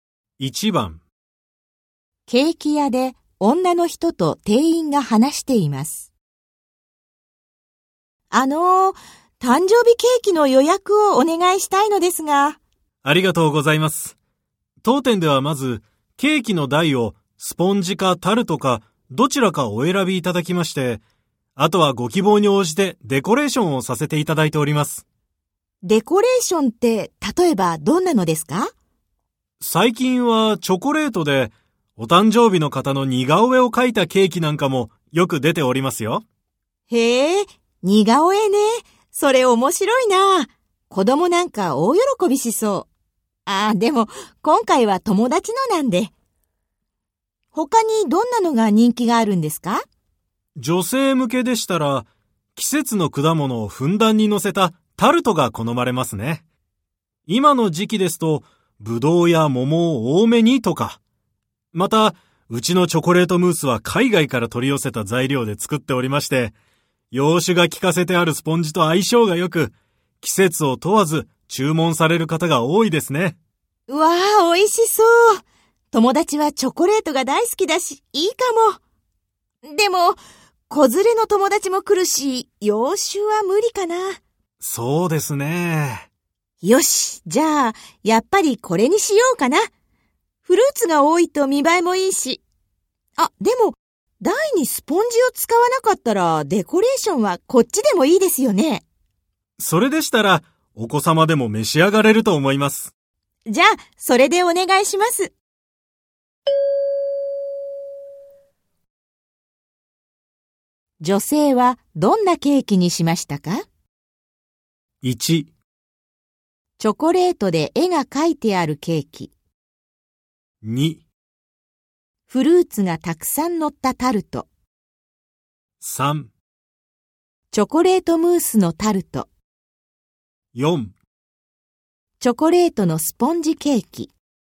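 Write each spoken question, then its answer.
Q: 女性はどんなケーキにしましたか?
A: 3: チョコレートムースのタルト。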